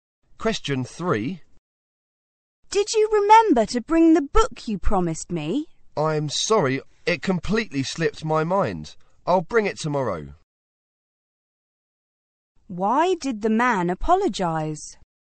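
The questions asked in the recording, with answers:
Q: Why did the man apologize?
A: He forgot to bring the book he promised.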